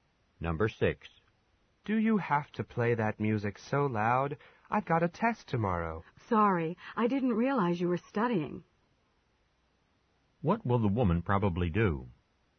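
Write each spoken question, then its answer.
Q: What will the woman probably do?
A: Turn the music down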